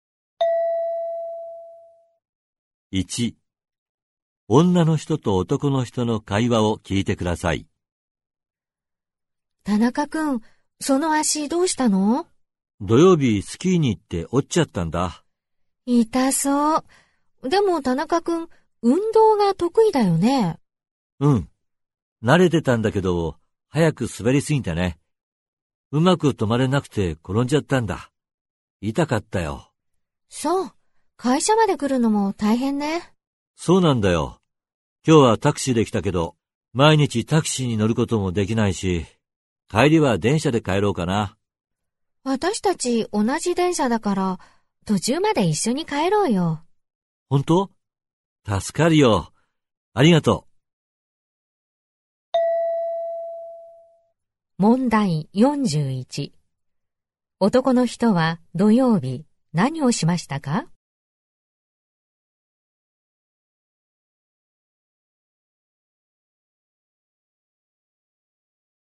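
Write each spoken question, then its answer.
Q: 男の人は土曜日何をしましたか?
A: スキーに行って足を折った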